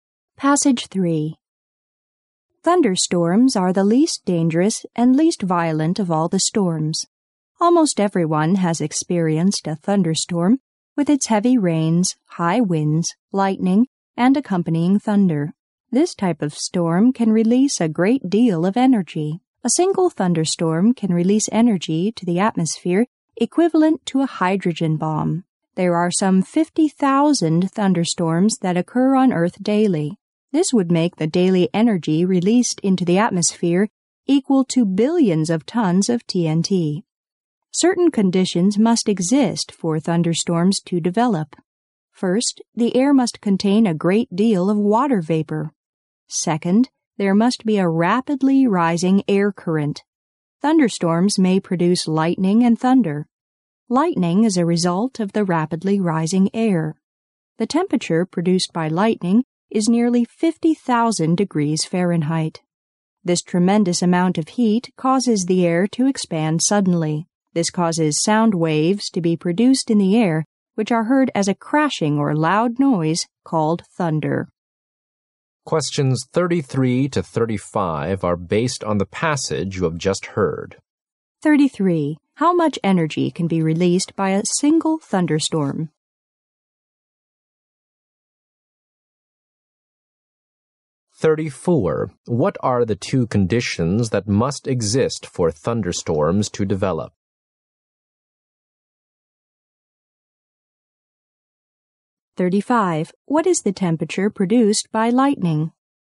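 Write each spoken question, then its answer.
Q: How much energy can be released by a single thunderstorm?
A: As much as a hydrogen bomb

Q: What are the two conditions that must exist for thunderstorms to develop?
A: Air with a lot of water vapor and a rapidly rising air current

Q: What is the temperature produced by lightning?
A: Nearly 50,000 degrees Fahrenheit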